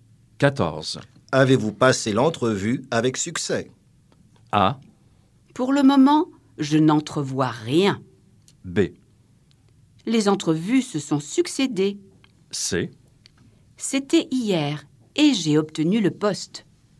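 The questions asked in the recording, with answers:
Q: Avez-vous passé l'entrevue avec succès?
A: C: C'était hier et j'ai obtenu le poste.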